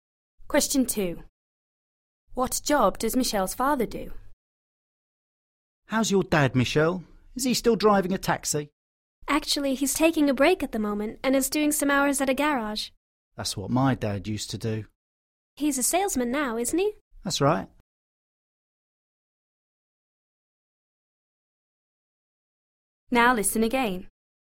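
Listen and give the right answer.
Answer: He works at a garage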